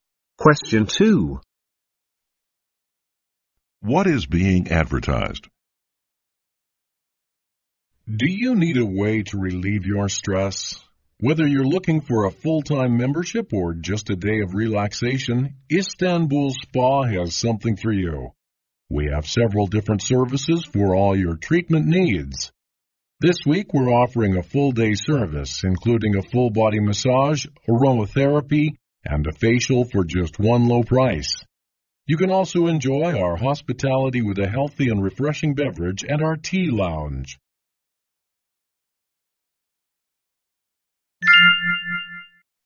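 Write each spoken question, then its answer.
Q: What is being advertised?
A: A spa (Istanbul Spa)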